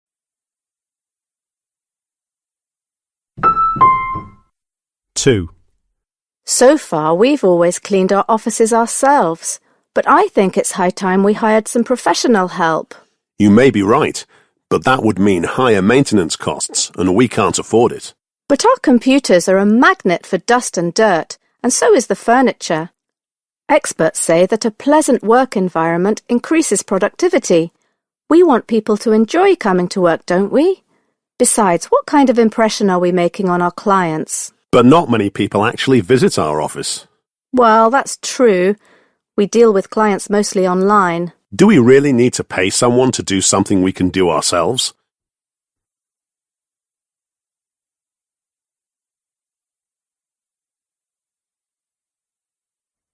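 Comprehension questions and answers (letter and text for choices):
Przesłuchaj dwukrotnie tekst. Z podanych odpowiedzi wybierz właściwą, zgodną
What are the speakers doing?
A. recommending the best way to deal with cleaning staff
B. encouraging cleaning staff to work more effectively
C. discussing the idea of employing cleaning staff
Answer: C. discussing the idea of employing cleaning staff

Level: matura rozszerzona 2022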